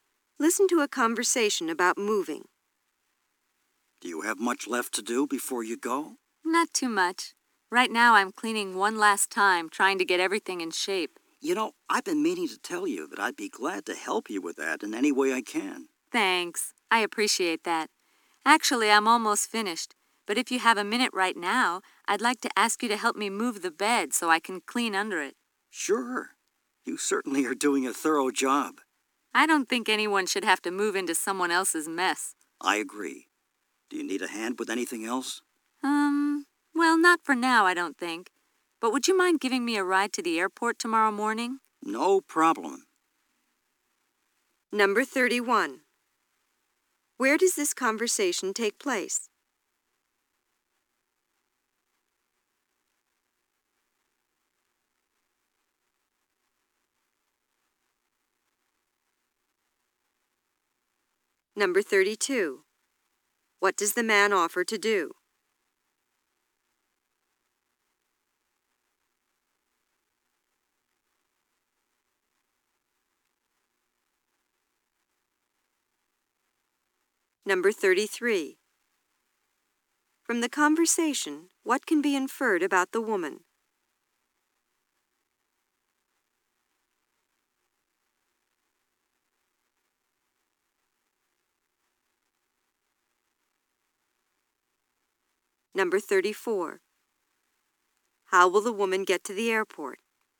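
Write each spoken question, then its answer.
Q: Where does this conversation take place?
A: In the woman's home, which she is leaving

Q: What does the man offer to do?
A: Help her get ready to move

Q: From the conversation, what can be inferred about the woman?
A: She is moving away

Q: How will the woman get to the airport?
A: The man will drive her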